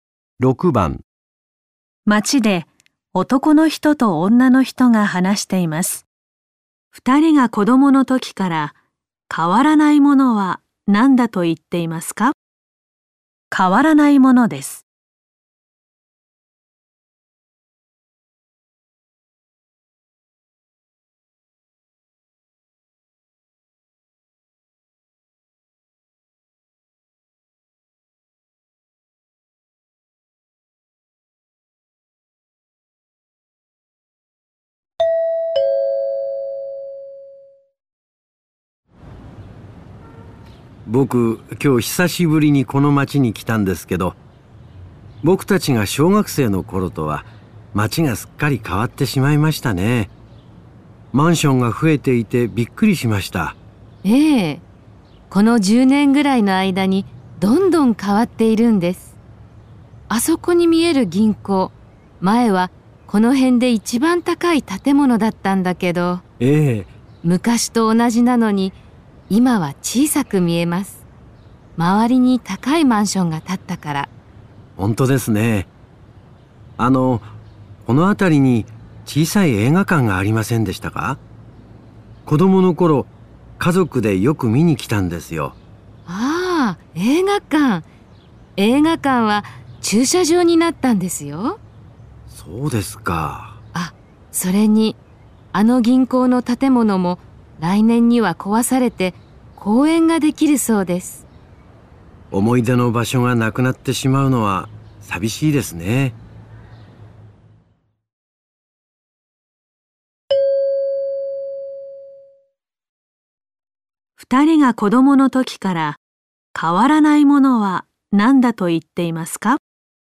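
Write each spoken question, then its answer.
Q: 二人が子供の時から変わらないものは何だと言っていますか?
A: 銀行の建物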